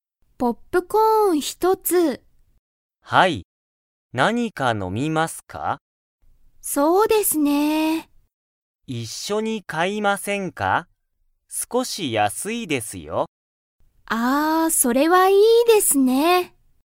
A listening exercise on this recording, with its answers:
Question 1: アキは、何(なに)か飲(の)みますか?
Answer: はい